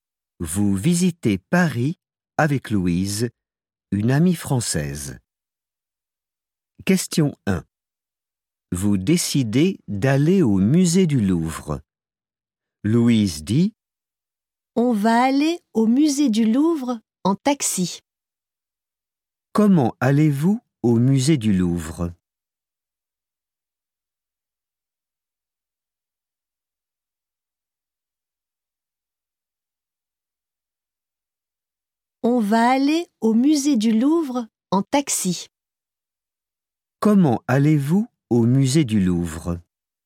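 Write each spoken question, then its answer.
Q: Comment allez-vous au musée du Louvre?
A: En taxi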